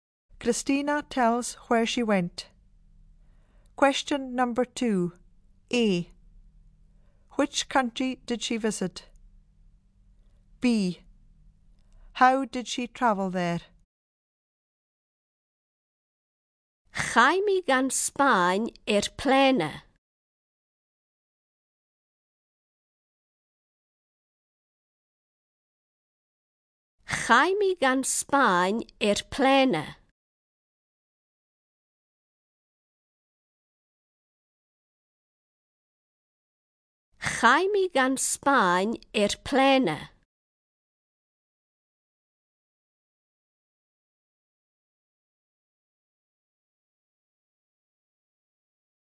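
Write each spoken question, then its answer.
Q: Which country did she visit?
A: Spain

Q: How did she travel there?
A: By plane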